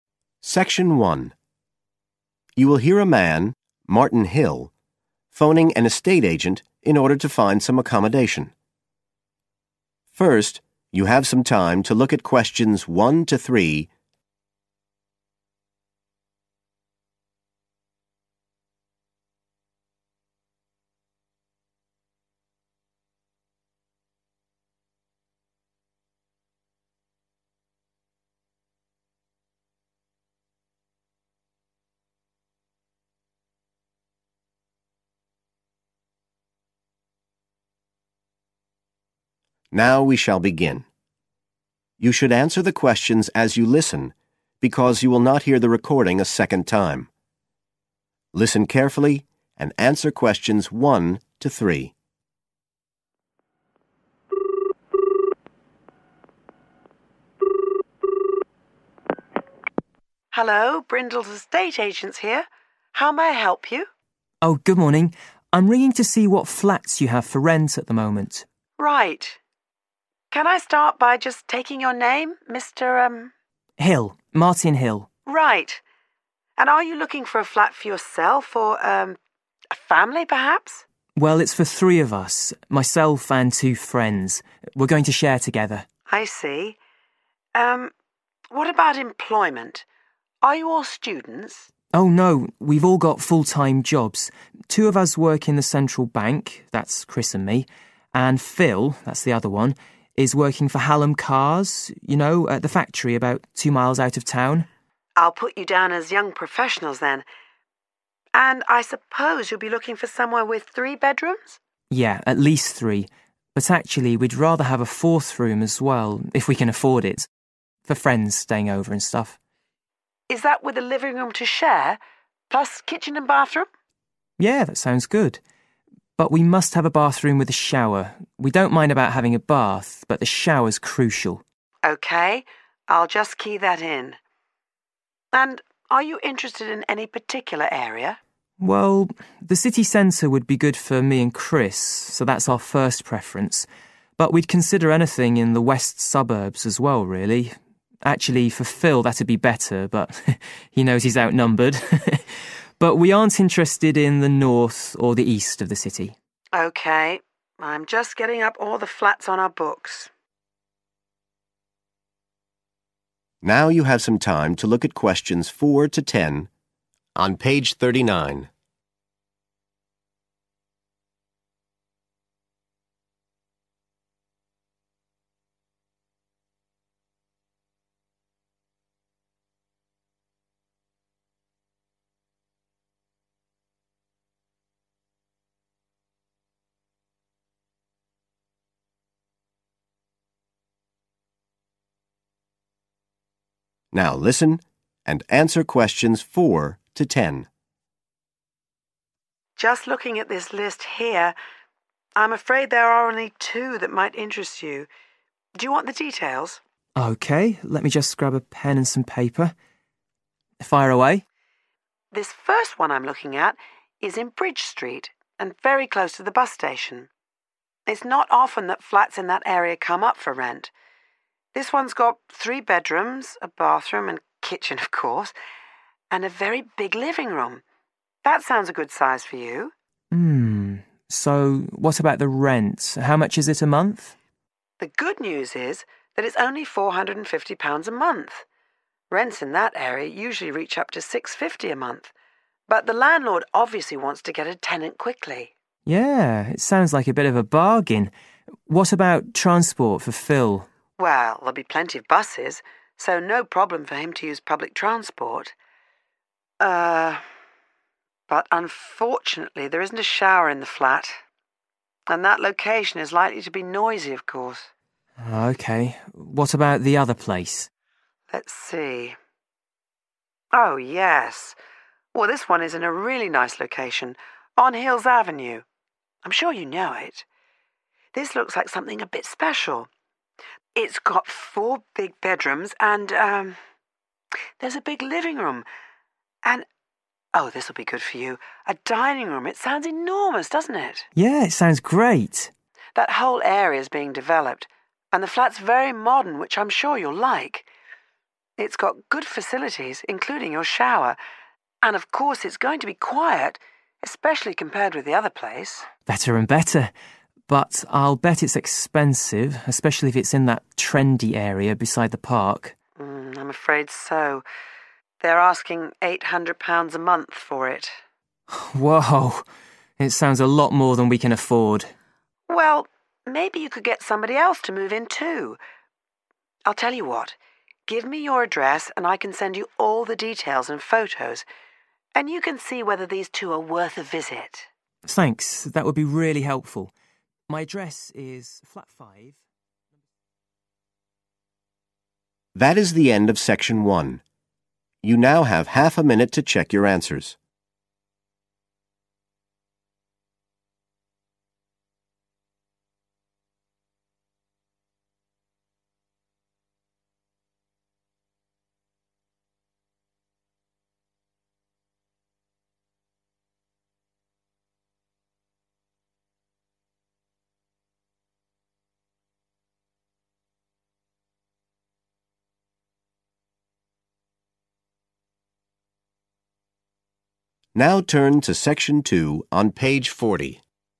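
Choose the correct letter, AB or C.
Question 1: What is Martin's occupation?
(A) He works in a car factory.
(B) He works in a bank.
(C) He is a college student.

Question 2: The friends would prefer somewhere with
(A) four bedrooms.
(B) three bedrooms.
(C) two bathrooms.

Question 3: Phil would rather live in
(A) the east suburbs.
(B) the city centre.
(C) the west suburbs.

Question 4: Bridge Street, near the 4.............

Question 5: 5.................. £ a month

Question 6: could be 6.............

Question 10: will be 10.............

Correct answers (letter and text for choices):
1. (B) He works in a bank.
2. (A) four bedrooms.
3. (C) the west suburbs.
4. bus station
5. 450
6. noisy
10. quiet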